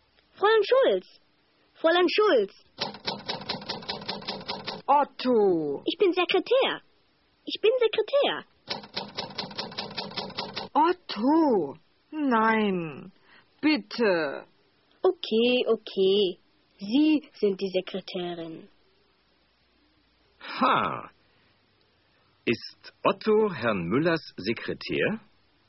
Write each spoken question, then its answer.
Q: Ist Otto Herrn Müllers Sekretär?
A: Nein, er ist nicht Herrn Müllers Sekretär.